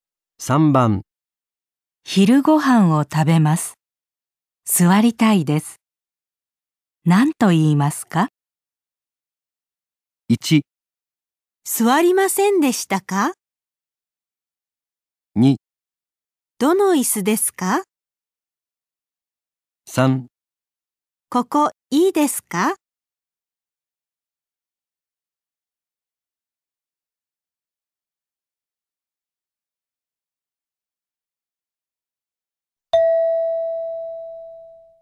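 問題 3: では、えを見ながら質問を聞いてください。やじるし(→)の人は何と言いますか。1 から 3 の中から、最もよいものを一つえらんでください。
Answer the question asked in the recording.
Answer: ここいいですか

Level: N5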